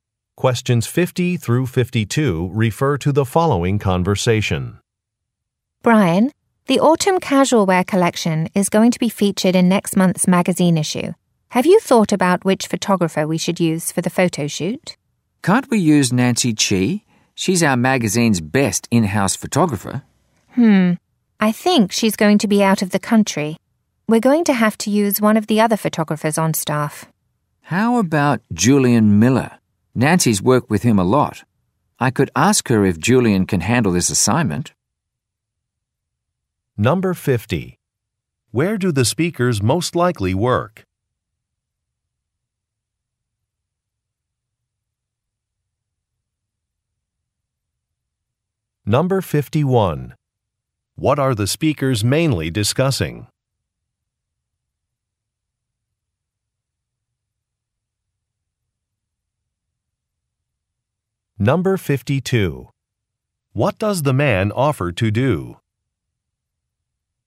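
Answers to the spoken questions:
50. At a magazine
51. Choosing a photographer for a photo shoot
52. Ask Nancy about Julian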